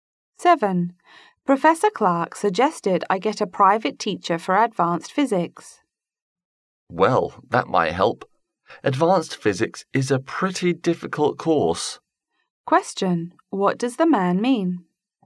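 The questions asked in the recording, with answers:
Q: What does the man mean?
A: A private teacher might help because advanced physics is difficult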